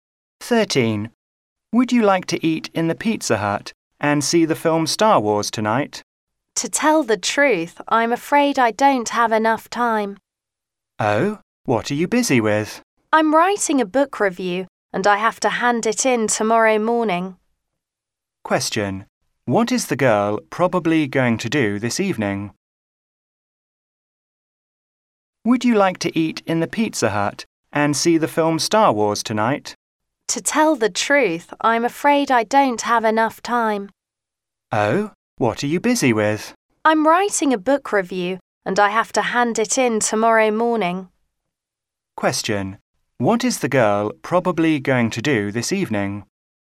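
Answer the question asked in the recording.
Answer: Write a book review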